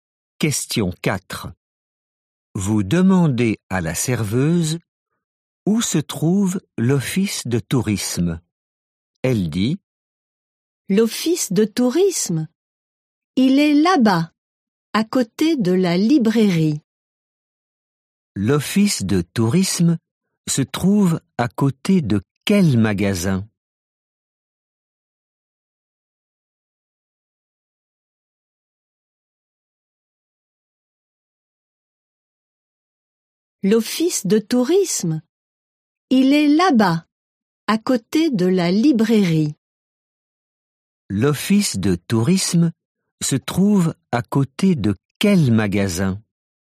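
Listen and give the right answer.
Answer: la librairie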